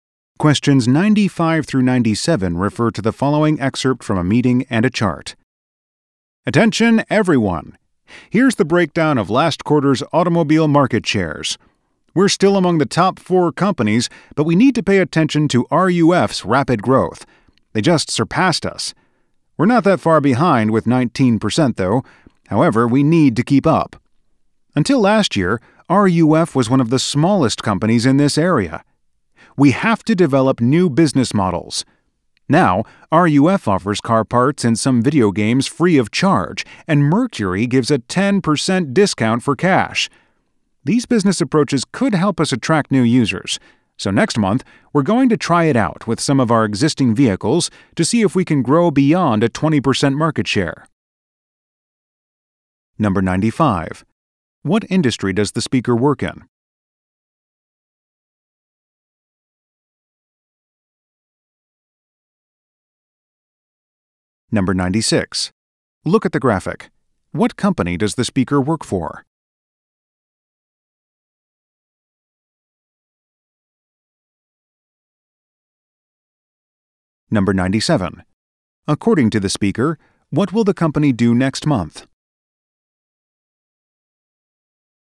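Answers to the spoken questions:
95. The automobile industry
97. Test new business approaches with some existing vehicles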